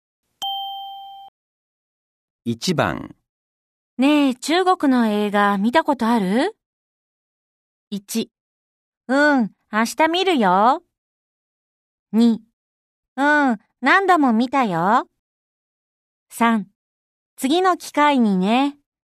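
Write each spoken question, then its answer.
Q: ねえ、中国の映画見たことある ?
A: 2: うん、何度も見たよ。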